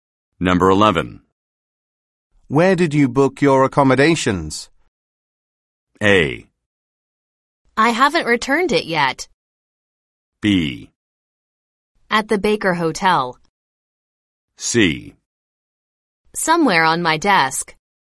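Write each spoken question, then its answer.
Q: Where did you book your accommodations?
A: B: At the Baker Hotel.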